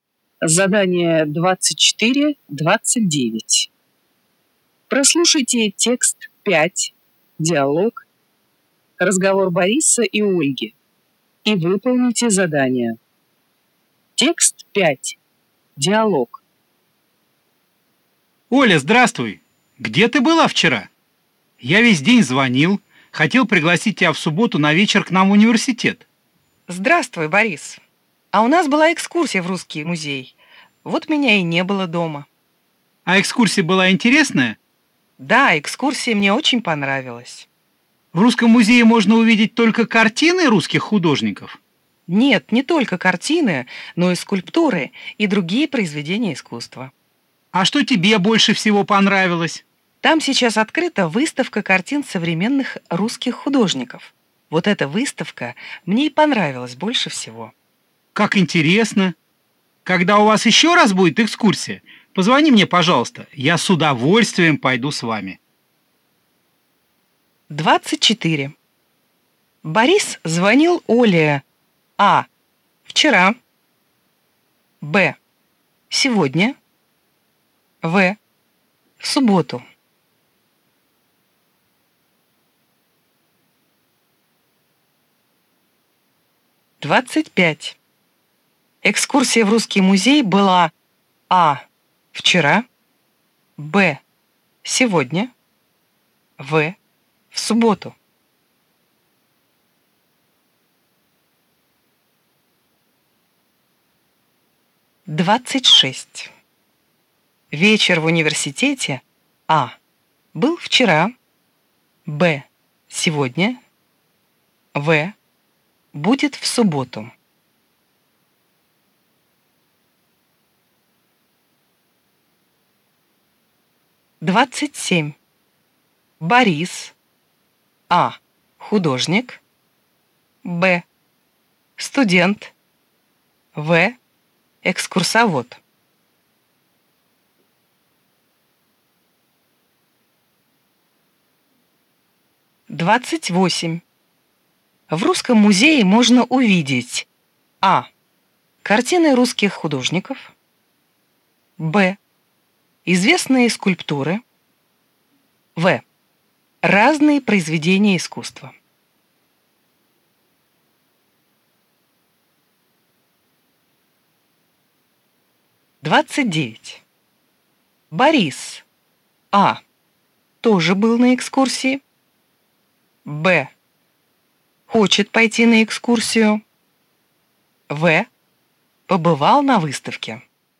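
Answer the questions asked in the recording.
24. А: Вчера
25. А: Вчера
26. В: Будет в субботу
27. Б: Студент
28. В: Разные произведения искусства
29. Б: Хочет пойти на экскурсию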